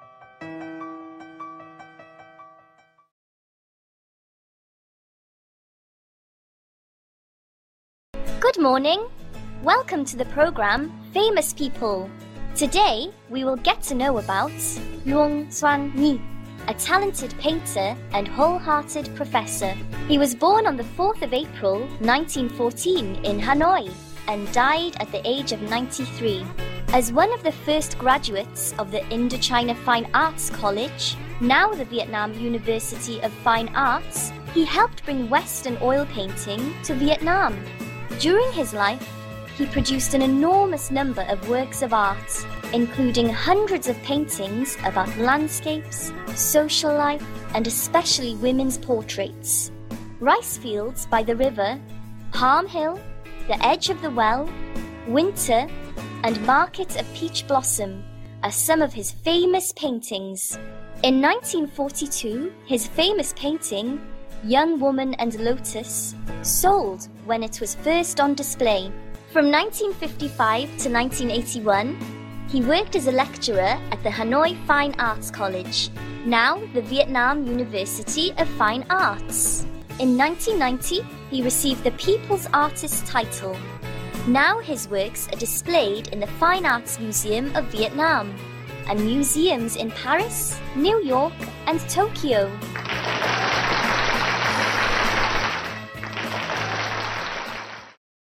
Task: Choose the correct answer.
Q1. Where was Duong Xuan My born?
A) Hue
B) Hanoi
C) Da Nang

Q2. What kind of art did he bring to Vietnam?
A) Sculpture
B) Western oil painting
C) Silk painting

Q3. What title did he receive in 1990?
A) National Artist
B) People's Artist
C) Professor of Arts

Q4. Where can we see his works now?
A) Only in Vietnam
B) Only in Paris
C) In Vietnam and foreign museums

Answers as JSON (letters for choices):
{"1": "B", "2": "B", "3": "B", "4": "C"}

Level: lớp 7